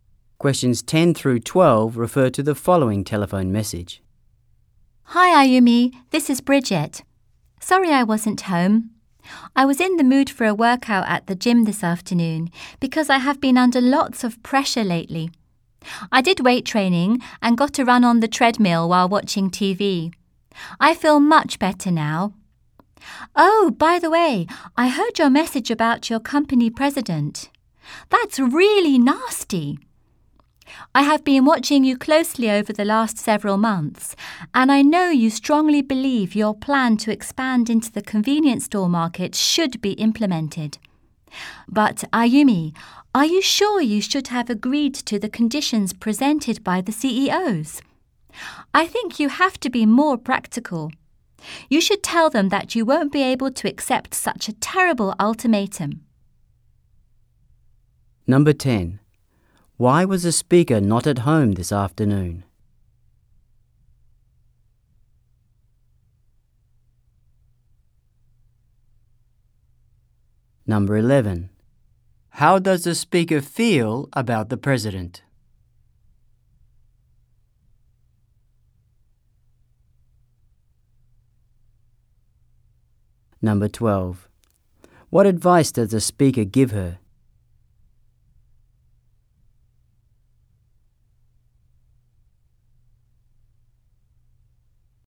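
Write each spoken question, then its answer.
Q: Why was the speaker not at home this afternoon?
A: She was working out at the gym.

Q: What advice does the speaker give her?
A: To be more practical and refuse the ultimatum.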